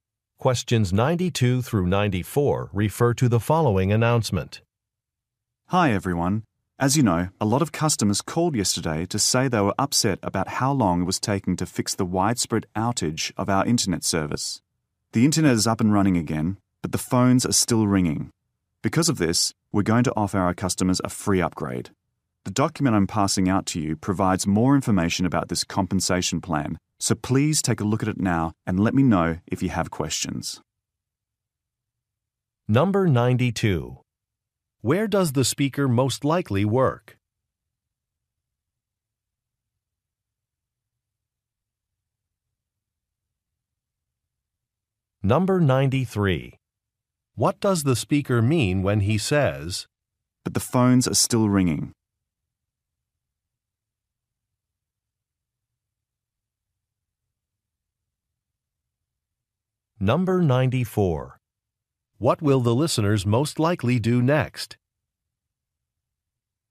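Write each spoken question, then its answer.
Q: Where does the speaker most likely work?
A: At an internet service provider

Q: What does the speaker mean when he says,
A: Customers are still complaining

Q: What will the listeners most likely do next?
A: Read a document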